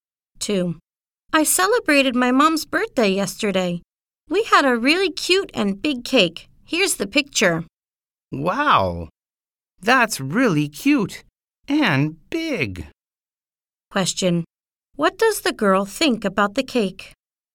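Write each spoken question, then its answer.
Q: What does the girl think about the cake?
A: It's really cute and big.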